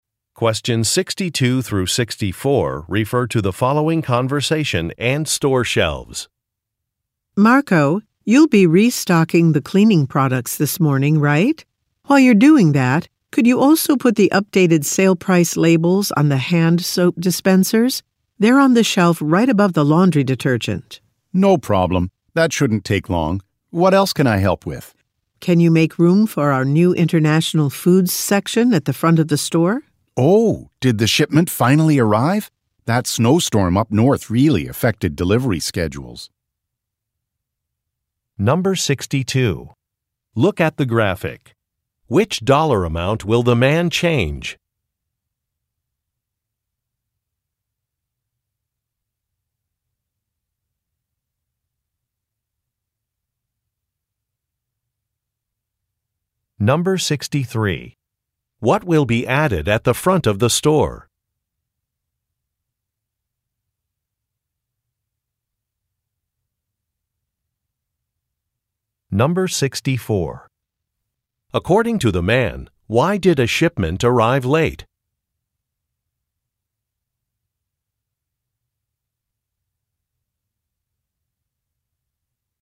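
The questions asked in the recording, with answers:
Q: What will be added at the front of the store?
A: A new international foods section

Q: According to the man, why did a shipment arrive late?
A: A snowstorm up north affected delivery schedules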